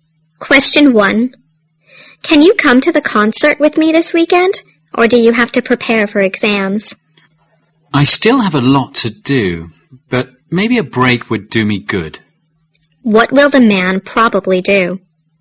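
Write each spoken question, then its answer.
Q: What will the man probably do?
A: Go to the concert with the woman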